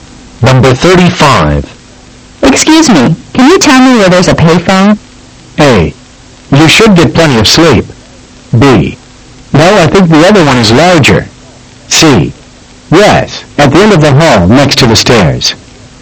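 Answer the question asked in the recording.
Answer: C: Yes, at the end of the hall, next to the stairs.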